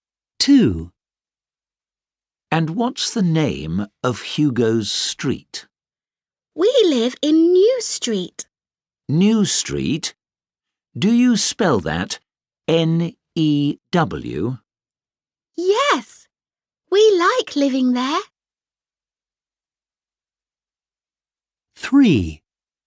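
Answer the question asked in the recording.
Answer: New Street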